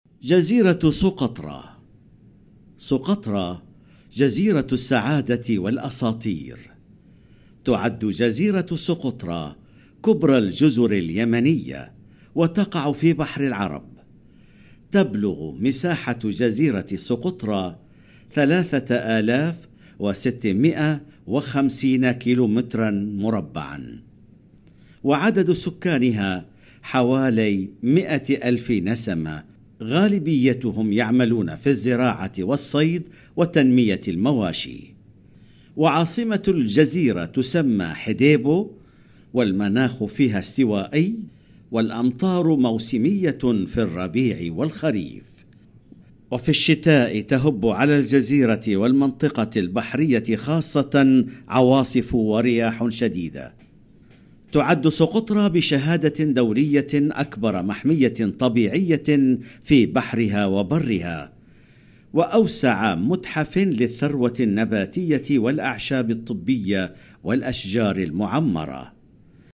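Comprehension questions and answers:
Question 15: تهب العواصف الشديدة على جزيرة سقطرى في فصل ....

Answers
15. الشتاء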